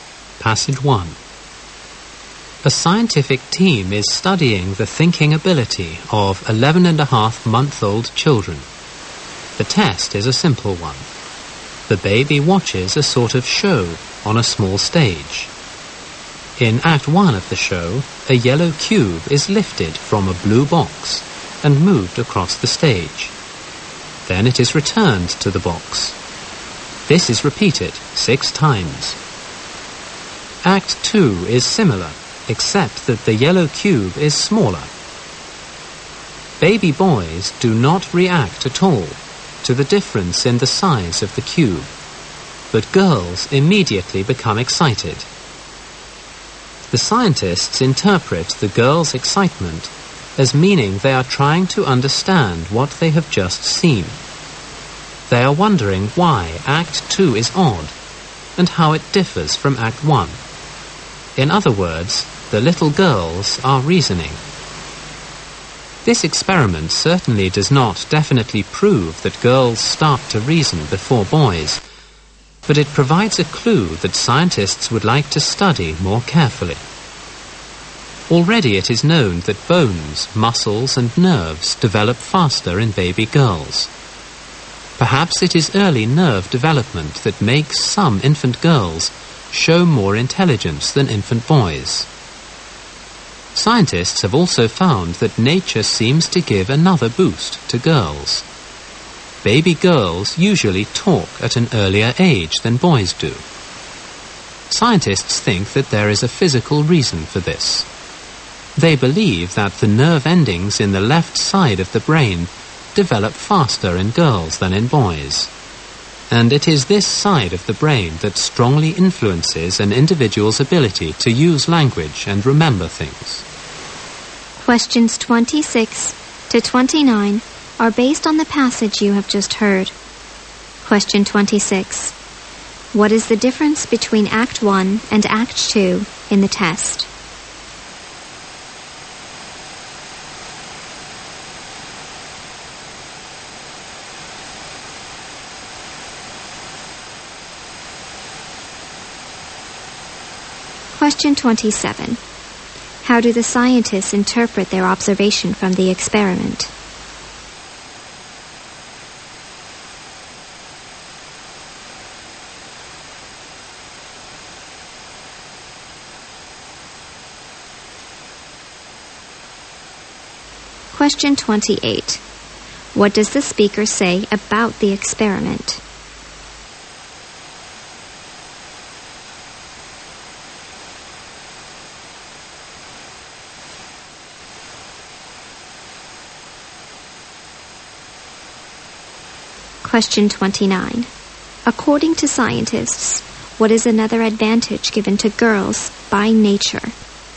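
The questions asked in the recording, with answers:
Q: What is the difference between Act 1 and Act 2 in the test?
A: The yellow cube is smaller in Act 2.

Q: How do the scientists interpret their observation from the experiment?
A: The girls' excitement shows they are reasoning.

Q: What does the speaker say about the experiment?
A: It doesn't prove girls reason earlier, but gives a clue for further study.

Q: According to scientists, what is another advantage given to girls by nature?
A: They talk at an earlier age than boys.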